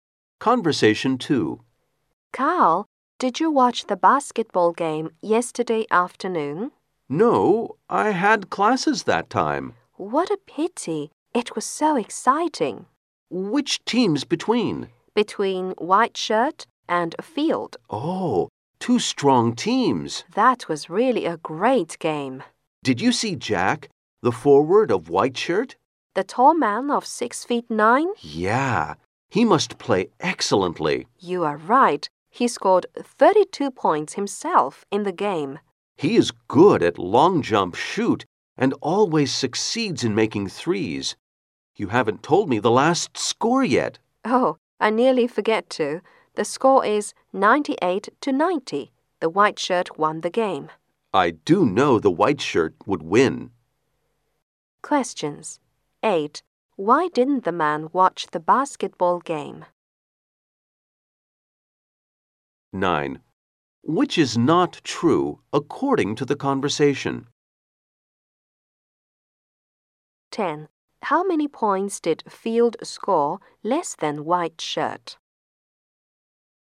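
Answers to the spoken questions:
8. He had classes then
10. 8 points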